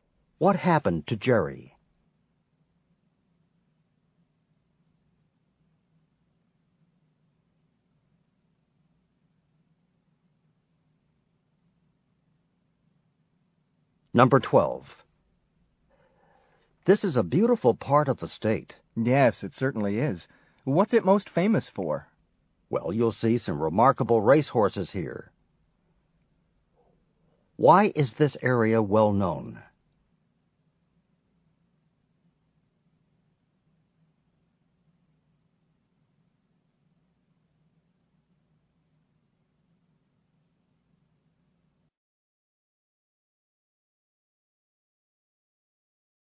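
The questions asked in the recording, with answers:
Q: Why is this area well known?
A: For its remarkable racehorses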